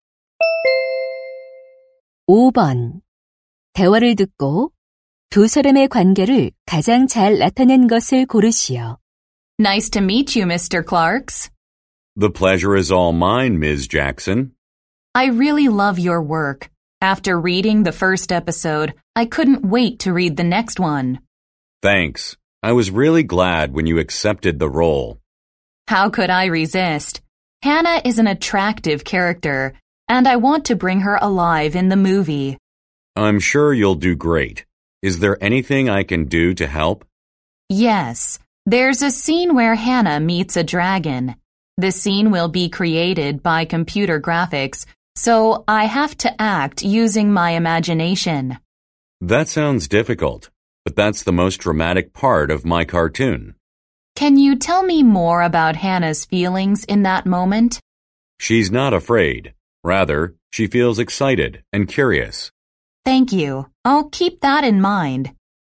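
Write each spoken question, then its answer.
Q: 대화를 듣고 두 사람의 관계를 가장 잘 나타낸 것을 고르시오.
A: 만화가 - 영화배우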